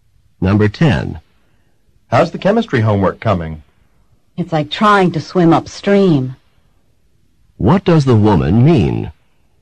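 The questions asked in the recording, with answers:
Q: What does the woman mean?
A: The homework is very difficult.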